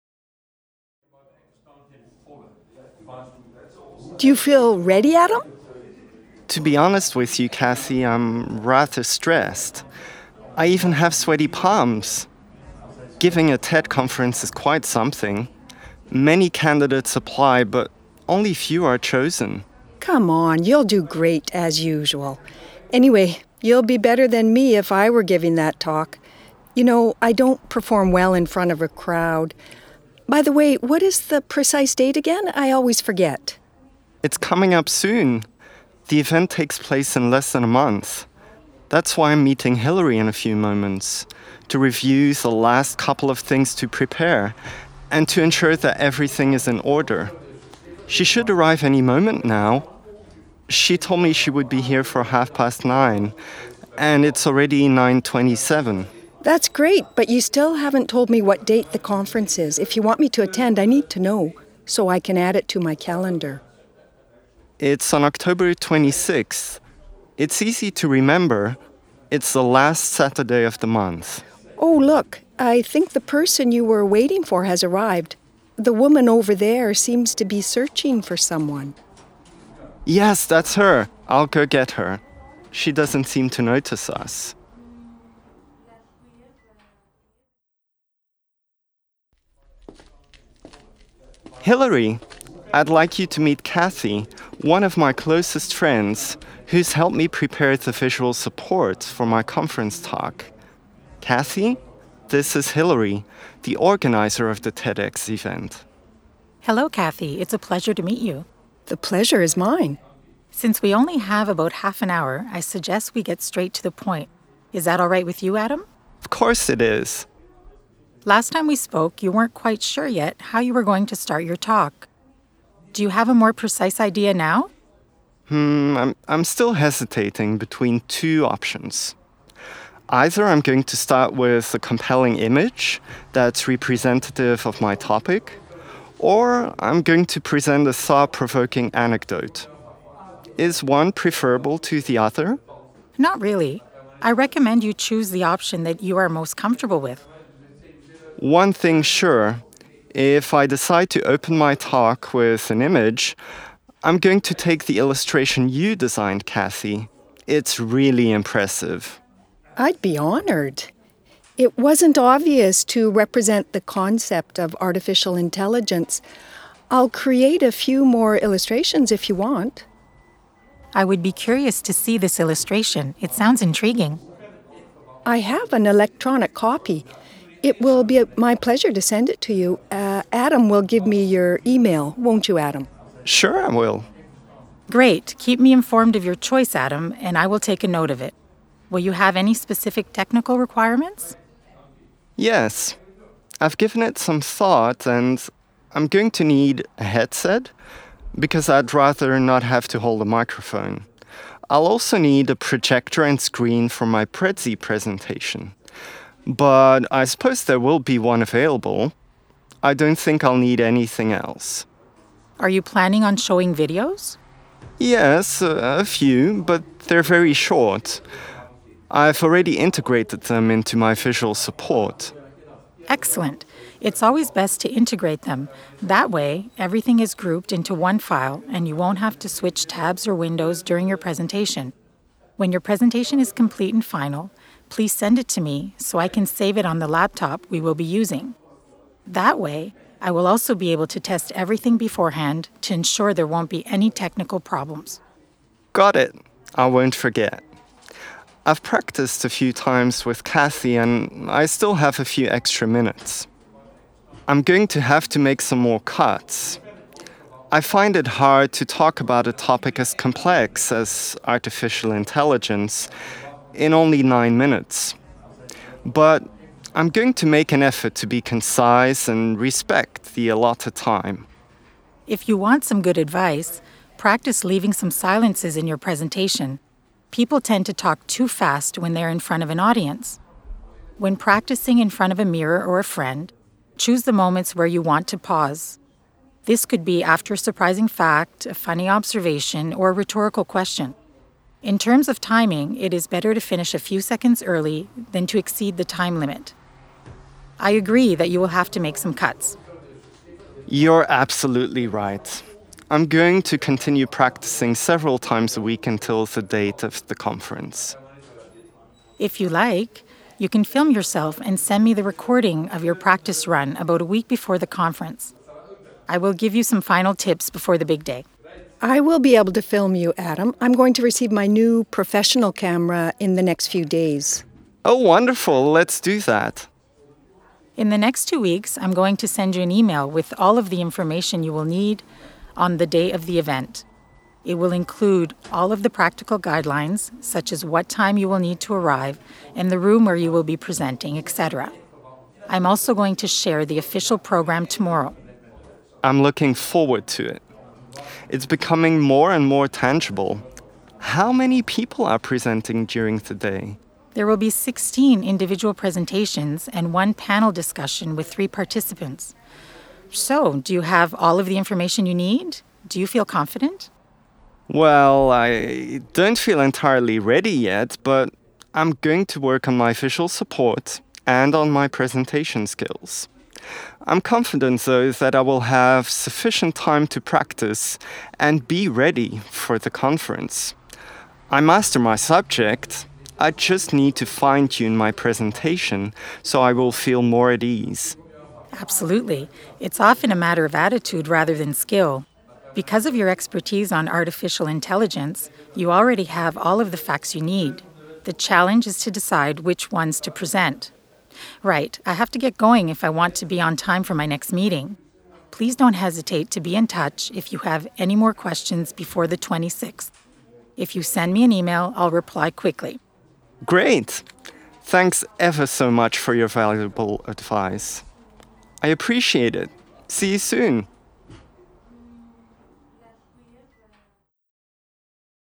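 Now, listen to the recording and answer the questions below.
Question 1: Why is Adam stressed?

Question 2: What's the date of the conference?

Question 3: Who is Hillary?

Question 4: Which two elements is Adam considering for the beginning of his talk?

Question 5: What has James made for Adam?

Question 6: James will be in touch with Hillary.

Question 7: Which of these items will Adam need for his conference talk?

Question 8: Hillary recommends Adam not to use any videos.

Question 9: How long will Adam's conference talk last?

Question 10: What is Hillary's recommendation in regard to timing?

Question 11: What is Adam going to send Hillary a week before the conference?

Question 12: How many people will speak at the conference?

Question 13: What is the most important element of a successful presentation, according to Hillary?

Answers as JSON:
{"1": "He is giving a TED conference talk.", "2": "October 26th", "3": "The organizer of the TEDx event", "4": "(image, an image, Anecdote, an anecdote)", "5": "An illustration (visual support) for his talk", "6": "True", "7": "A headset, a projector and a screen", "8": "False", "9": "9 minutes", "10": "Better to finish a few seconds early than exceed the time limit", "11": "A video recording of his practice run", "12": "19 (16 individual presentations plus a panel of three)", "13": "Attitude"}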